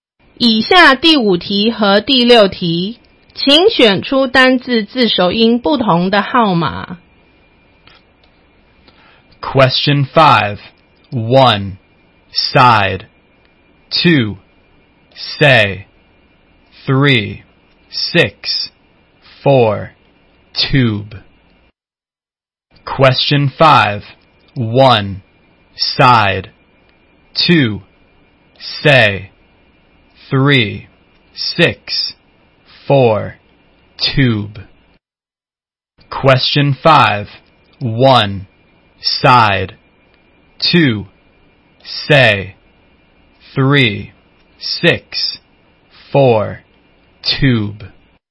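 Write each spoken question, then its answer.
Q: Question 5, 1, side, 2, say, 3, 6, 4, tube.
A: 4: tube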